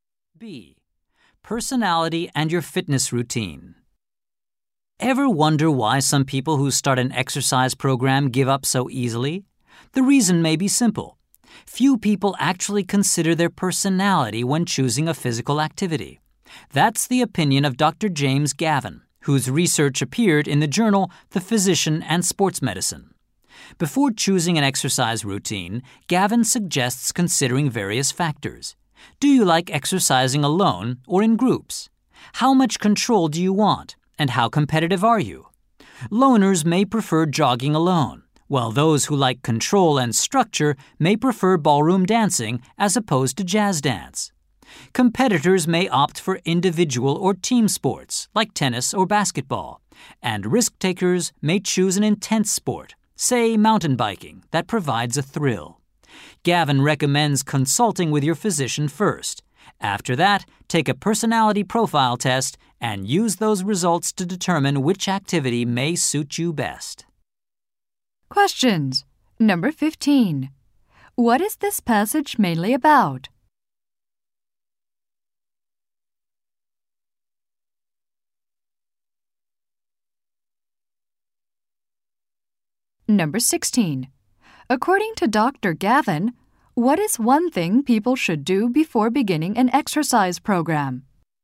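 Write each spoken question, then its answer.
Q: What is this passage mainly about?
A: Choosing exercise that suits your personality

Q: Gavin, what is one thing people should do before beginning an exercise program?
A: Consult a physician (and take a personality test)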